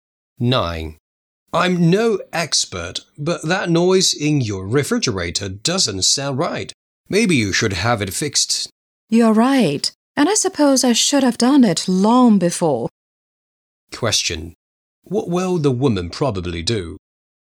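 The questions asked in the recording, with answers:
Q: What will the woman probably do?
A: Have the refrigerator fixed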